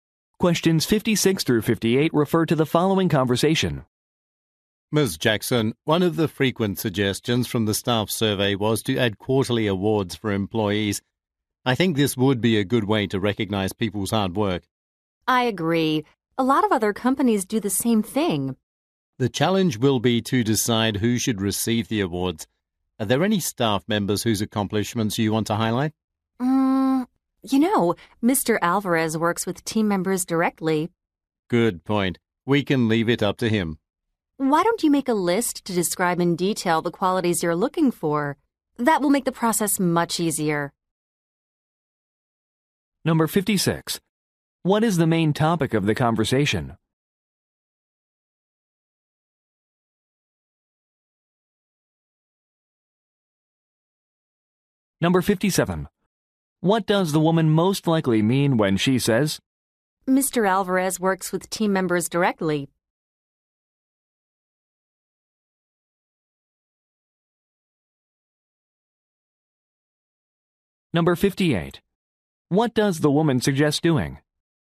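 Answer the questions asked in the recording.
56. Quarterly employee awards
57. Mr. Alvarez should choose the winners
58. Making a list of desired qualities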